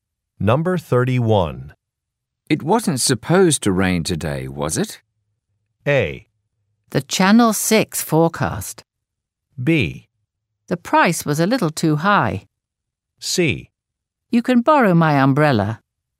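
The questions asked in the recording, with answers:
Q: It wasn't supposed to rain today, was it?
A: C: You can borrow my umbrella.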